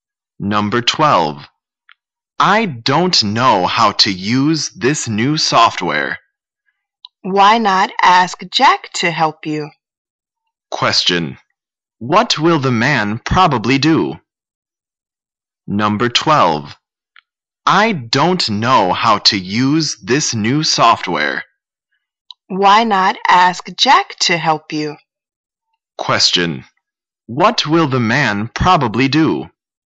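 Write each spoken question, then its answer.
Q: What will the man probably do?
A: Ask Jack for help with the new software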